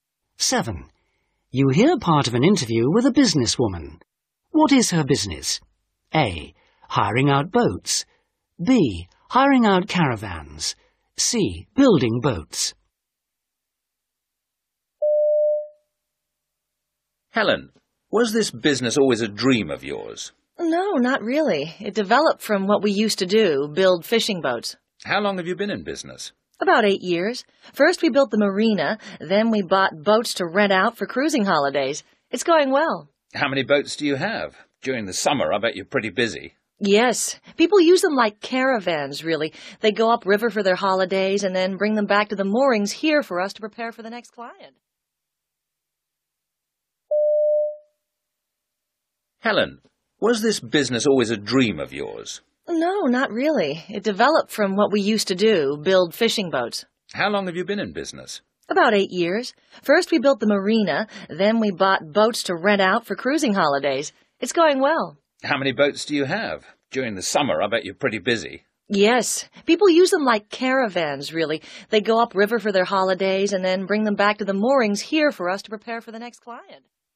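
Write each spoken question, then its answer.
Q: What is her business?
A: A: Hiring out boats.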